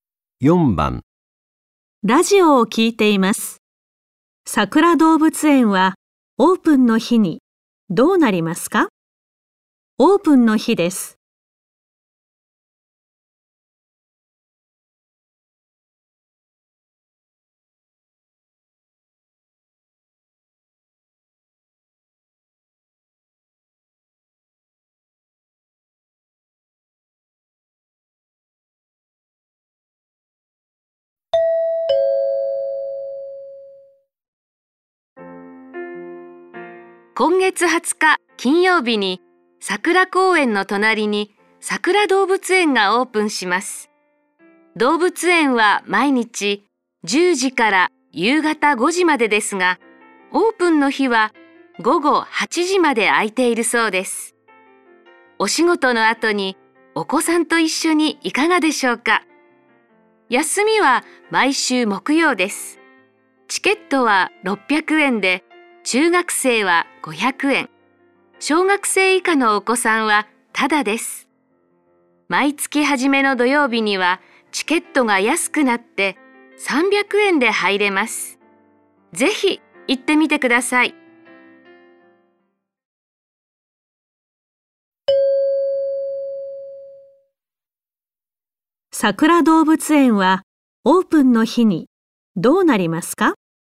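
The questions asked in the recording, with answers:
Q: 桜動物園はオープンの日にどうなりますか?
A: 午後8時まで開いている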